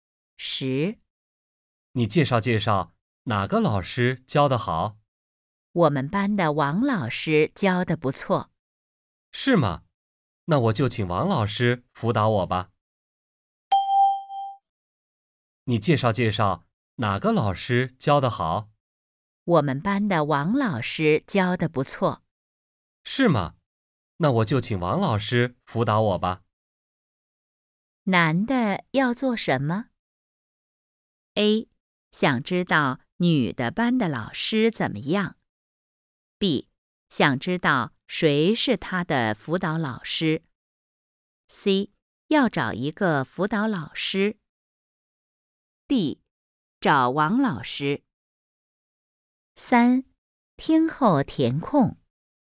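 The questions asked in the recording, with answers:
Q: 男的要做什么?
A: C: 要找一个辅导老师。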